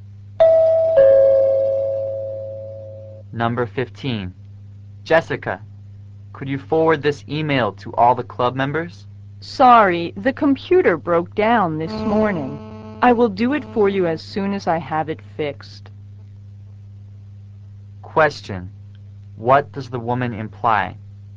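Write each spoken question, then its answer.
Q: What does the woman imply?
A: She can't forward the email until her computer is fixed.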